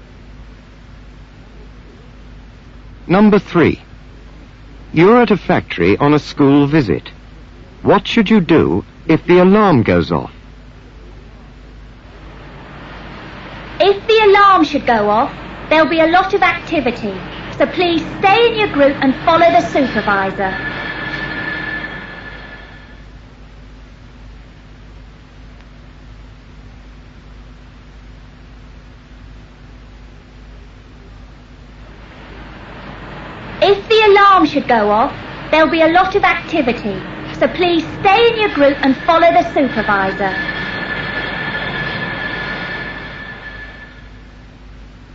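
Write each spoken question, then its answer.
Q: What should you do if the alarm goes off?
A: Stay in your group and follow the supervisor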